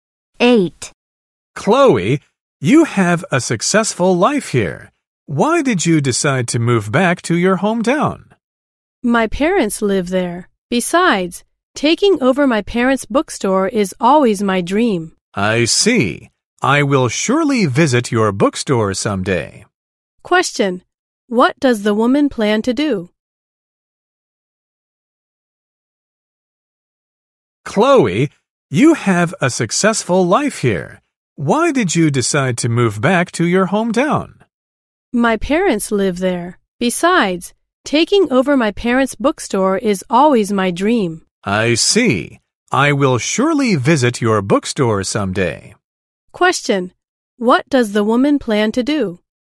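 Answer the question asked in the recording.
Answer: Move back to her hometown and take over her parents' bookstore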